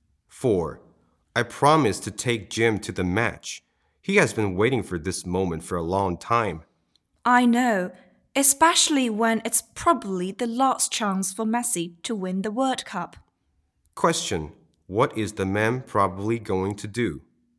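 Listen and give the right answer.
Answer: Take Jim to watch a World Cup match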